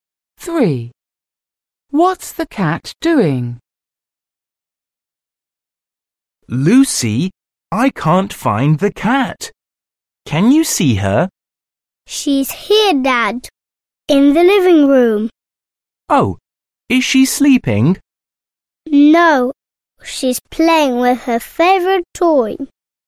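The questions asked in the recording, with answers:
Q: What's the cat doing?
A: Playing with her favourite toy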